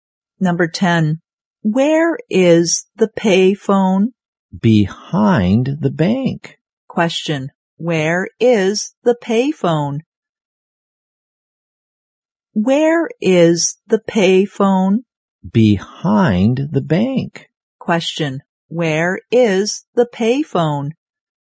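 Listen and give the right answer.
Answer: Behind the bank.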